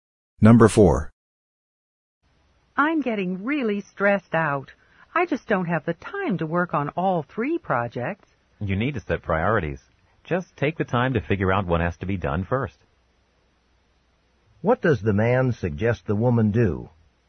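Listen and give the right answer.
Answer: Decide which project to do first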